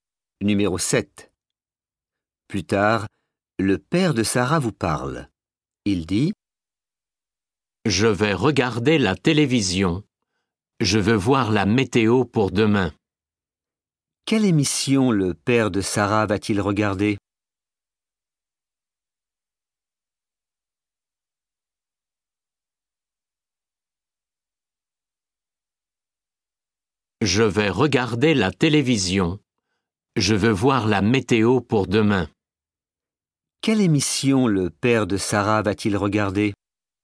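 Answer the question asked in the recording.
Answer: La météo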